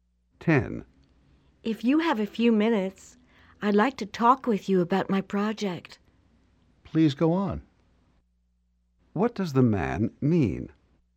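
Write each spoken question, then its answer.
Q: What does the man mean?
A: He is willing to listen; she should continue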